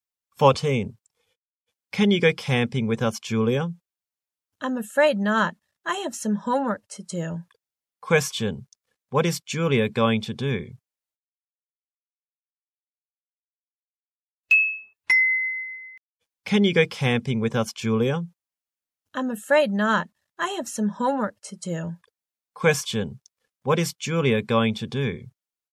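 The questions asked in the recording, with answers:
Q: What is Julia going to do?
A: Do her homework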